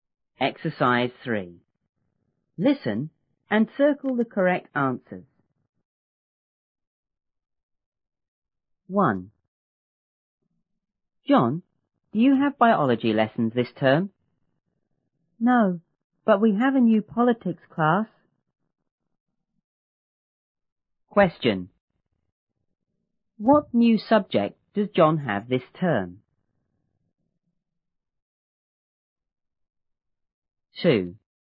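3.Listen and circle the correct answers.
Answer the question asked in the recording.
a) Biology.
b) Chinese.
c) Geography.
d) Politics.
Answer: d) Politics.

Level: 初中英语广州版1B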